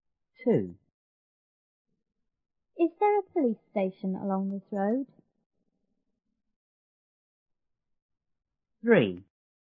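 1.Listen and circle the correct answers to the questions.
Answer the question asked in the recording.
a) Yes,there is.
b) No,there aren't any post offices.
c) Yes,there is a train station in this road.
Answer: a) Yes,there is.

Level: 初中英语广州版1B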